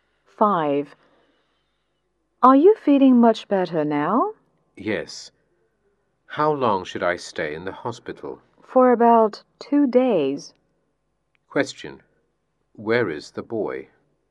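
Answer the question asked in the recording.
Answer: In the hospital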